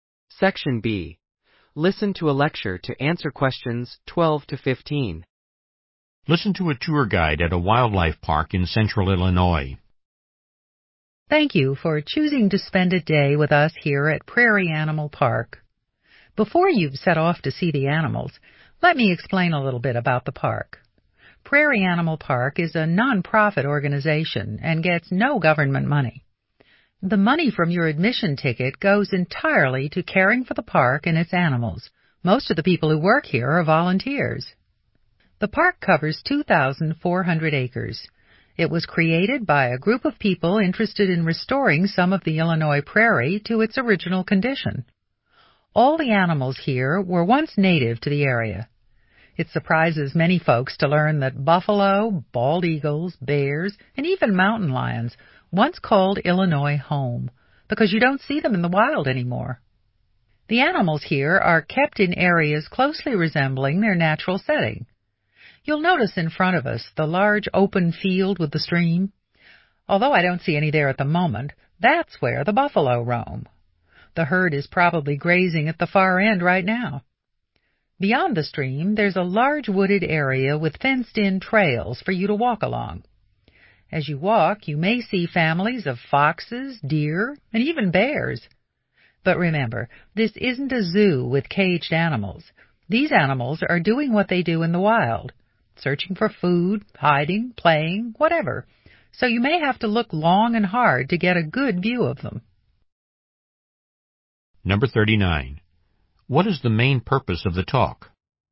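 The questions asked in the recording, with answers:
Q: What is the main purpose of the talk?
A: To give visitors some information about the park before they see the animals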